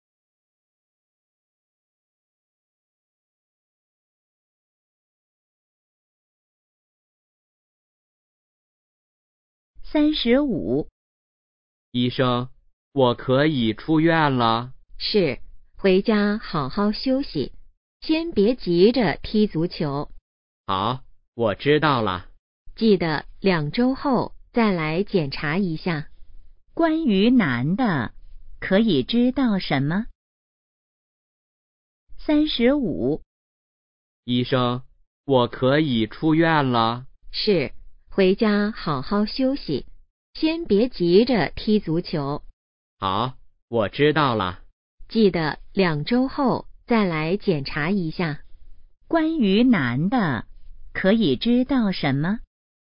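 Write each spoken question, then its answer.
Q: 关于男的,可以知道什么?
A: 他可以出院了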